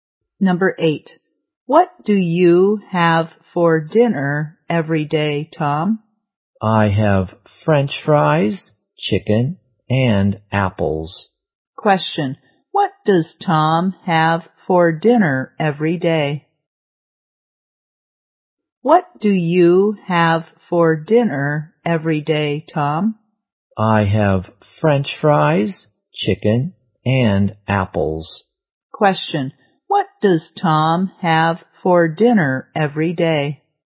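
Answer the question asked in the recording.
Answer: French fries, chicken and apples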